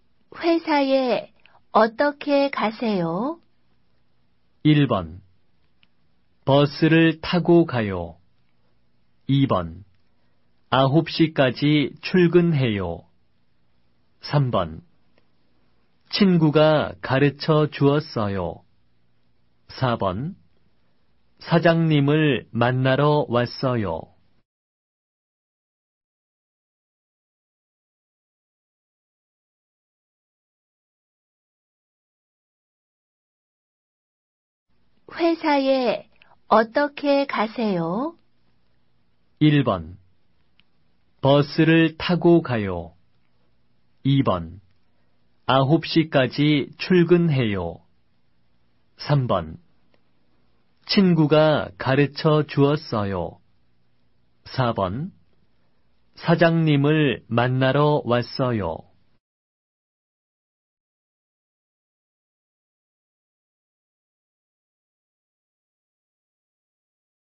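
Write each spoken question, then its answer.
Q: 회사에 어떻게 가세요?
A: 1: 버스를 타고 가요.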